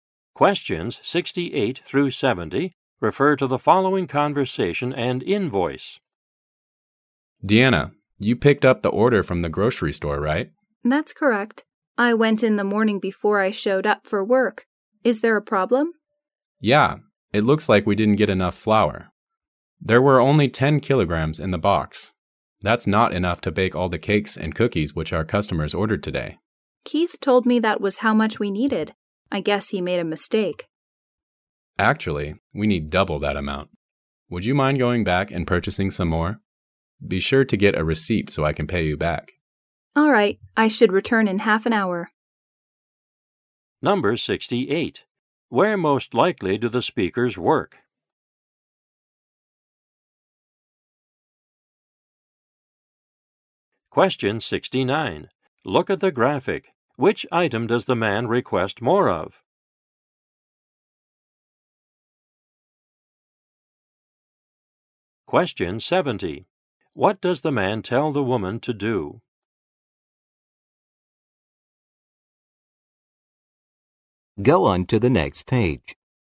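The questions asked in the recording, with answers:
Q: Where most likely do the speakers work?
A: At a bakery

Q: What does the man tell the woman to do?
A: Go back, buy more flour and get a receipt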